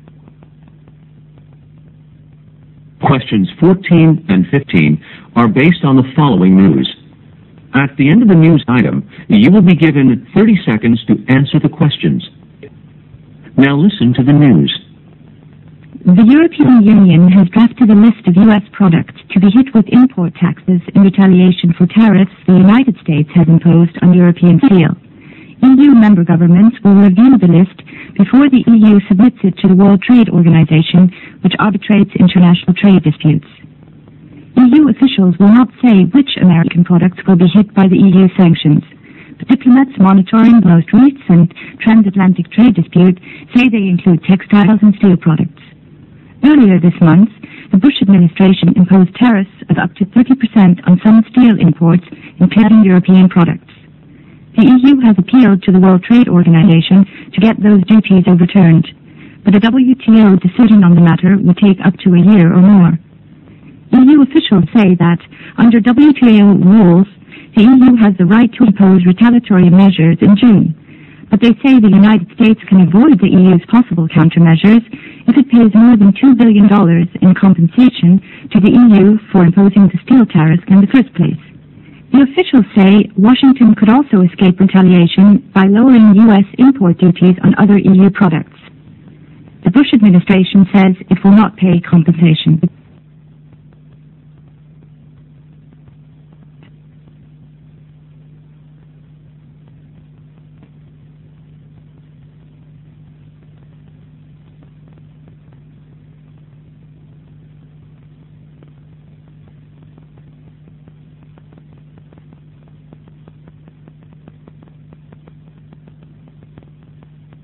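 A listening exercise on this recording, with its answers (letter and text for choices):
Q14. The trade dispute between the European Union and the US was caused by ____.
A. US refusal to accept arbitration by WTO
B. US imposing tariffs on European steel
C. US refusal to pay compensation to EU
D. US refusal to lower import duties on EU products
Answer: B. US imposing tariffs on European steel

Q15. Who will be consulted first before the EU list is submitted to WTO?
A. EU member states.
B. The United States.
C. WTO.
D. The steel corporations.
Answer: A. EU member states.

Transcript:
Questions 14 and 15 are based on the following news. At the end of the news item, you will be given 30 seconds to answer the questions. Now listen to the news.
The European Union has drafted a list of US products to be hit with import taxes in retaliation for tariffs the United States has imposed on European steel. 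EU member governments will review the list before the EU submits it to the World Trade Organization, which arbitrates international trade disputes. EU officials will not say which American products will be hit by the EU sanctions. But diplomats monitoring the most recent transAtlantic trade dispute say they include textiles and steel products.
Earlier this month, the Bush administration imposed tariffs of up to 30 percent on some steel imports, including European products.
The EU has appealed to the World Trade Organization to get those duties overturned. But a WTO decision on the matter could take up to a year or more. EU officials say that, under WTO rules, the EU has the right to impose retaliatory measures in June. But they say the United States can avoid the EU's possible countermeasures if it pays more than two billion dollars in compensation to the EU for imposing the steel tariffs in the first place. 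The officials say Washington could also escape retaliation by lowering U.S. import duties on other EU products.
The Bush administration says it will not pay compensation.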